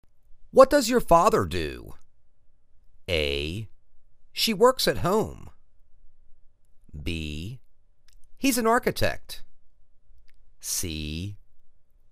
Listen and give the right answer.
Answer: He's an architect.